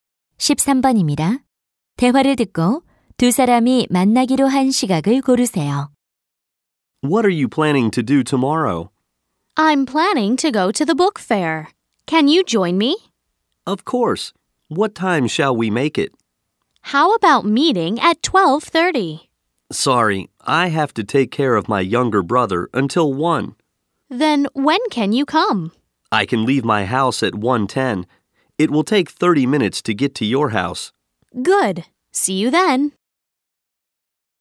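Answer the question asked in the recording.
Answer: 1시 40분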